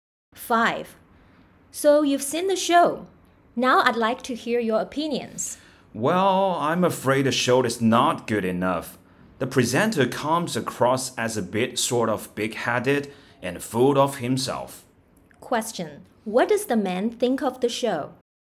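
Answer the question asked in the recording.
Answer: It's not good; the presenter seems arrogant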